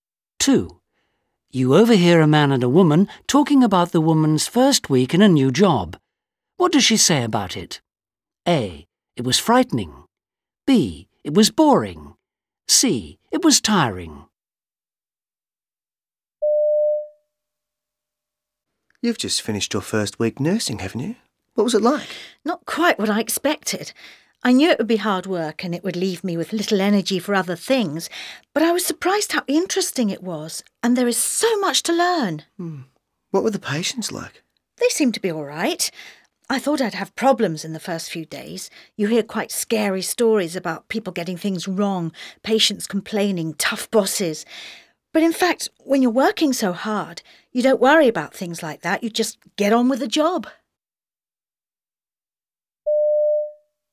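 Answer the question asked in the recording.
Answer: C: It was tiring.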